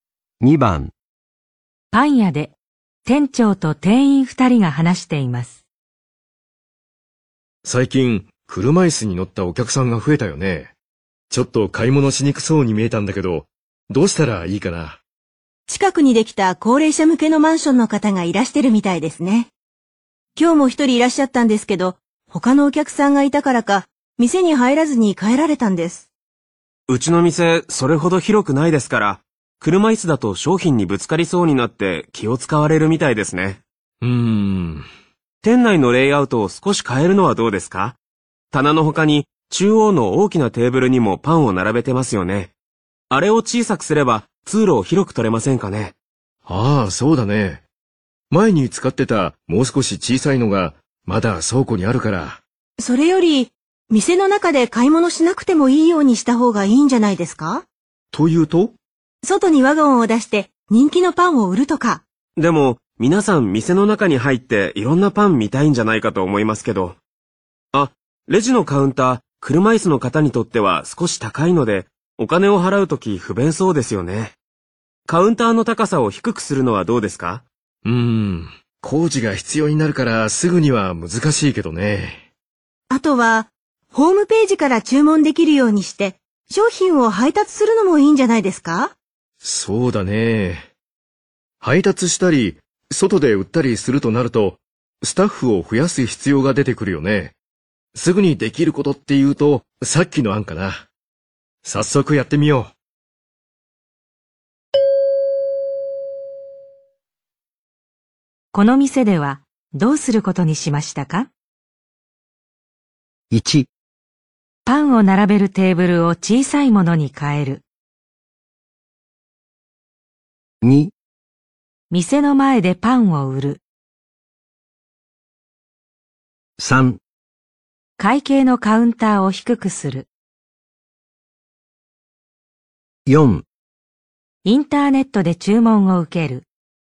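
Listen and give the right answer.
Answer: 1: パンを並べるテーブルを小さいものに変える。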